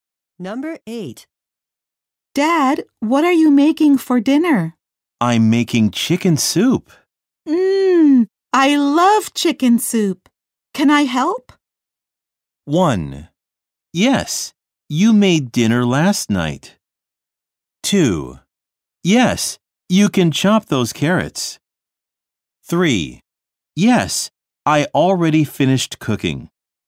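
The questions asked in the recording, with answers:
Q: I love chicken soup. Can I help?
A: 2: Yes, you can chop those carrots.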